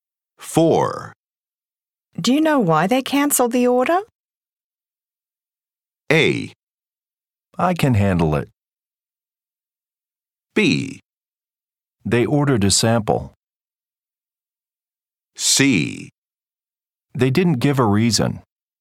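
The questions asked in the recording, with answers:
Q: Do you know why they cancelled the order?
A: C: They didn't give a reason.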